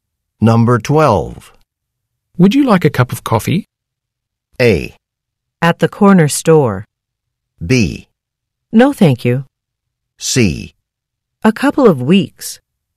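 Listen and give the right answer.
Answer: B: No, thank you.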